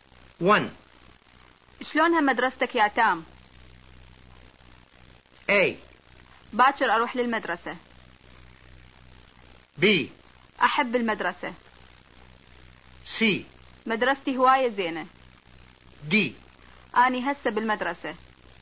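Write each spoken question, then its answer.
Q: شلونها مدرستك يا تام؟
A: C: مدرستي هواية زينة.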